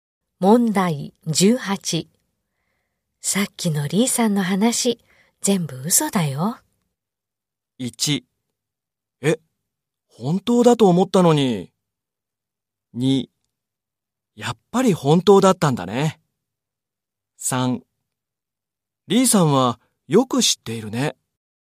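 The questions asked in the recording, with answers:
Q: さっきのリーさんの話、全部嘘だよ。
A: 1: え、本当だと思ったのに。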